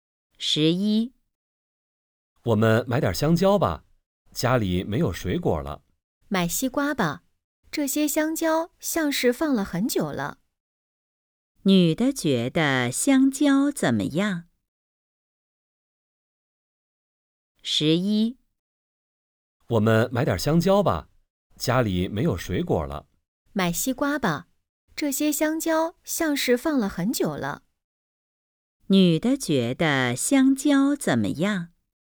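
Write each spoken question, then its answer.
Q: 女的觉得香蕉怎么样?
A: 不新鲜,像是放了很久了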